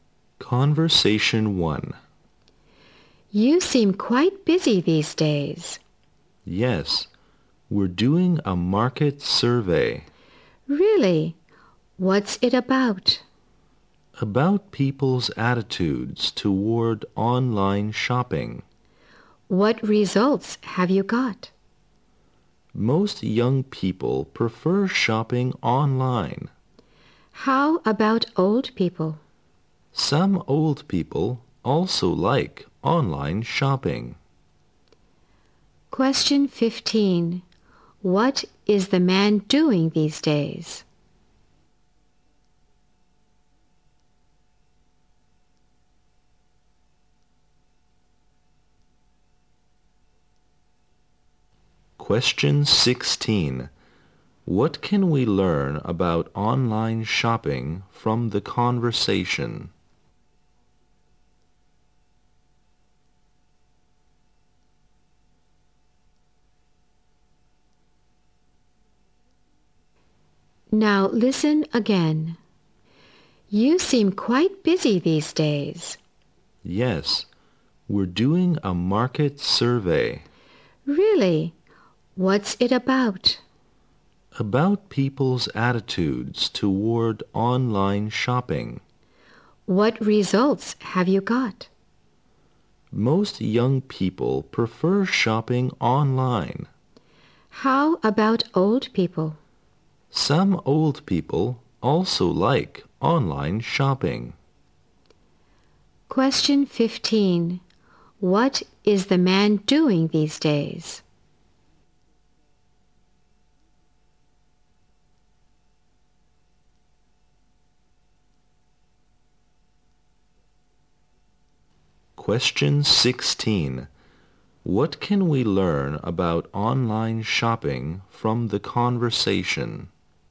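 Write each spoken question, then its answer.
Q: What is the man doing these days?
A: A market survey

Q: What can we learn about online shopping from the conversation?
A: Most young people prefer shopping online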